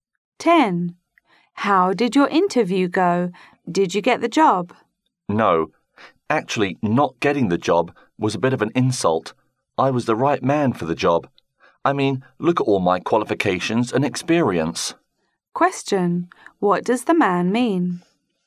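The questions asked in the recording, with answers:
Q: What does the man mean?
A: He thinks he deserved the job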